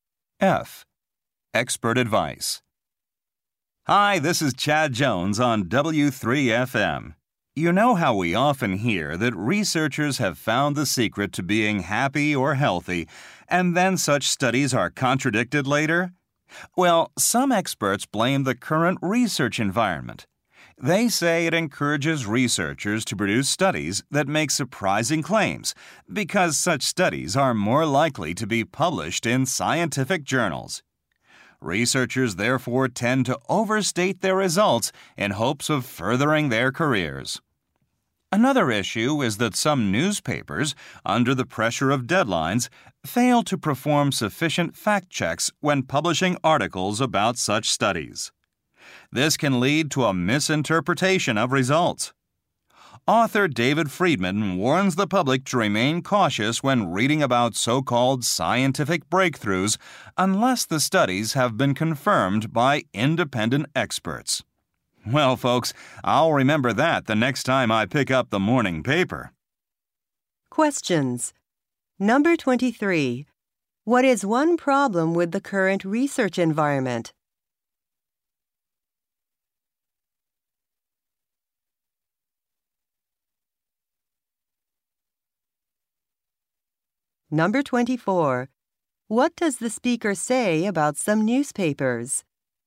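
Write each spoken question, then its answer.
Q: What is one problem with the current research environment?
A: It encourages researchers to make surprising or overstated claims

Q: What does the speaker say about some newspapers?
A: They don't check facts enough because of deadlines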